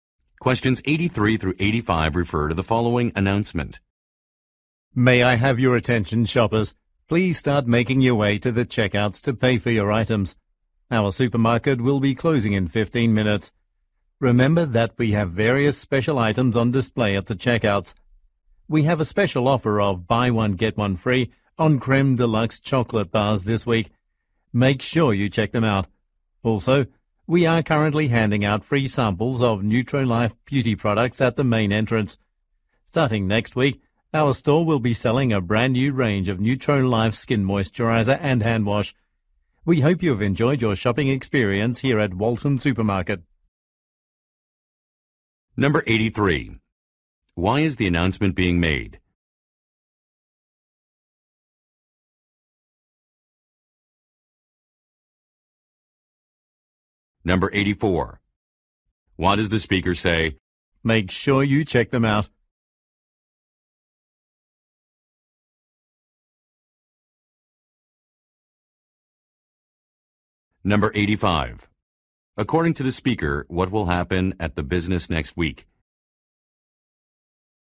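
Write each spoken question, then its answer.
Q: Why is the announcement being made?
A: The supermarket will close in 15 minutes

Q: According to the speaker, what will happen at the business next week?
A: It will start selling new Nutrolife skin care products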